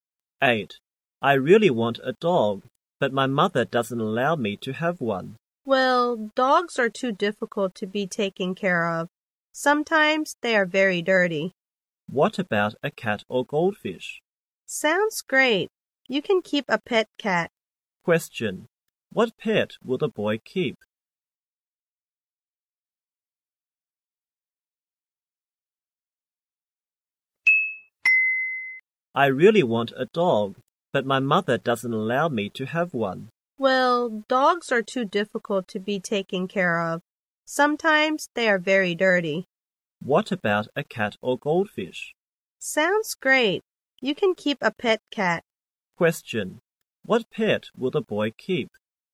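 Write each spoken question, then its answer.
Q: What pet will the boy keep?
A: A cat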